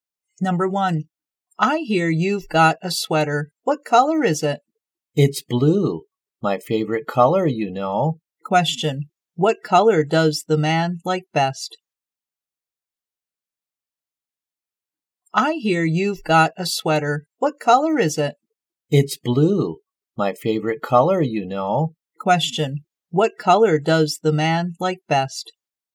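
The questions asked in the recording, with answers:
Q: what color does the man like best?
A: Blue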